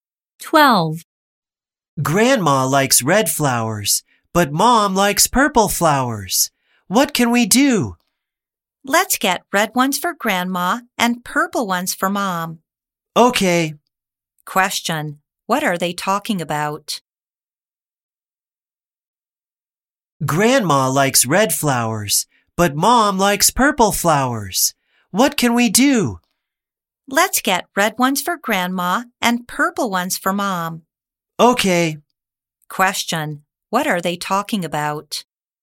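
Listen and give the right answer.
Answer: Flowers to get for Grandma and Mom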